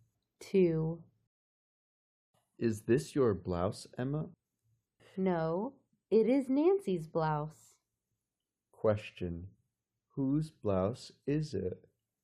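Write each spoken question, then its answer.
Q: Whose blouse is it?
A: Nancy's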